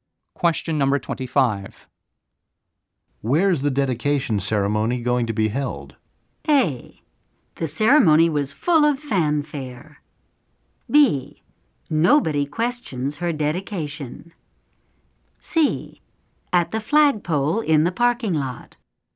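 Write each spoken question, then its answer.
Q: Where's the dedication ceremony going to be held?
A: C: At the flagpole in the parking lot.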